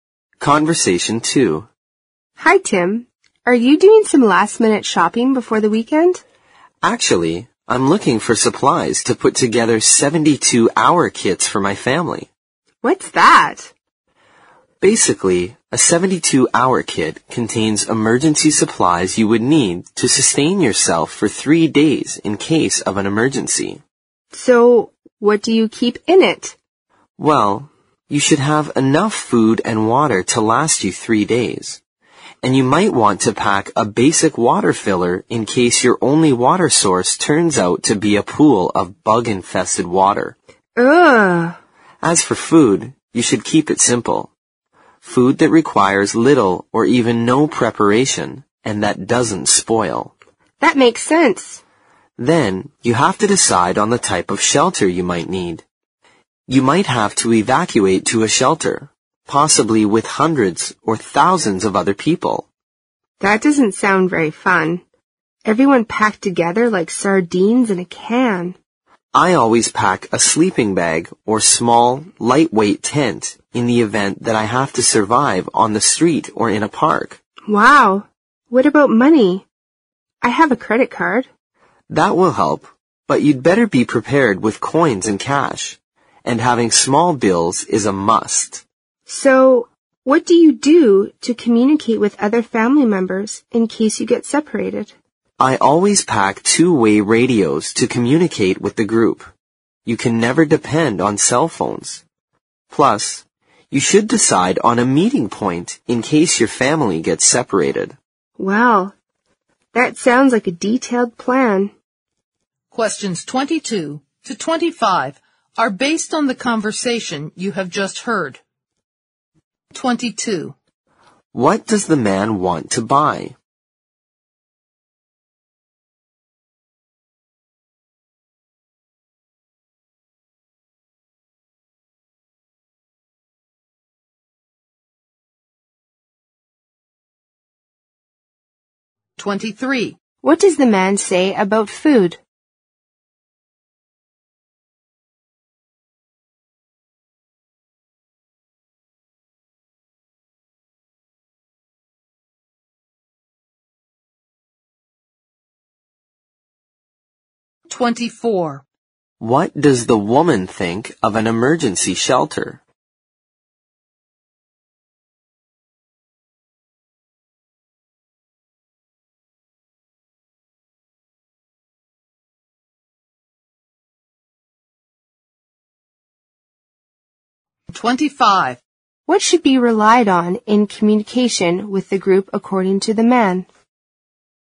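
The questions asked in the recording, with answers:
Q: What does the man want to buy?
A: Supplies for 72-hour emergency kits for his family

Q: What does the man say about food?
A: It should be simple, need little or no preparation and not spoil

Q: What does the woman think of an emergency shelter?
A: It doesn't sound fun; people are packed together like sardines

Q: What should be relied on in communication with the group according to the man?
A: Two-way radios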